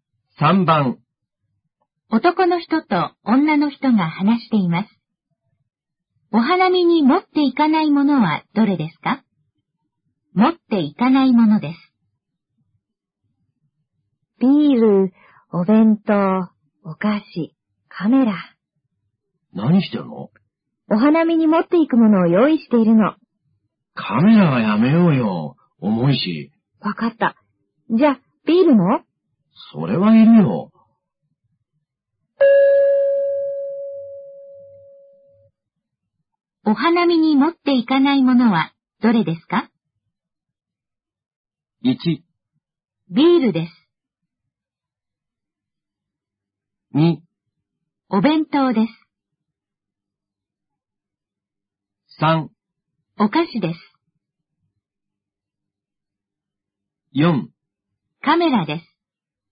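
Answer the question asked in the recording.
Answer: 4: カメラです。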